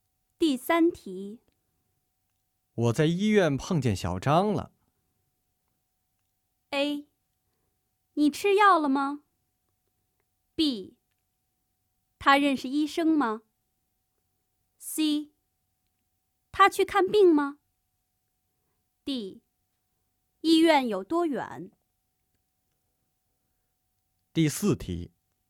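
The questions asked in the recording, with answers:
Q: 我在医院碰见小张了。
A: C: 他去看病吗?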